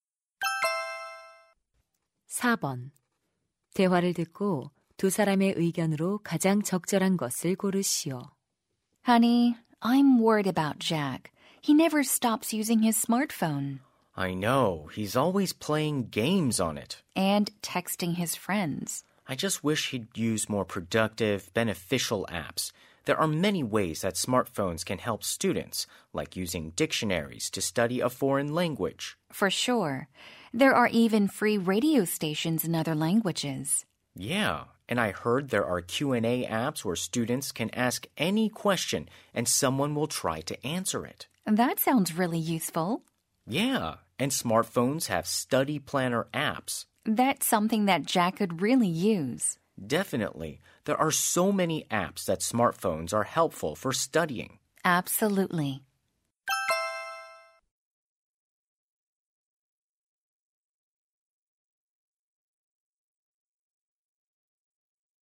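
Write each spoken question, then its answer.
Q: 대화를 듣고 두 사람의 의견으로 가장 적절한 것을 고르시오.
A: 스마트폰에는 학습에 유용한 앱이 많다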